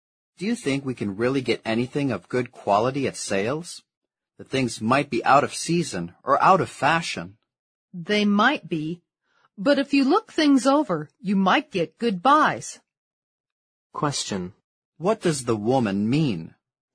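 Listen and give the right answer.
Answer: If you look things over carefully, you can get good bargains at sales.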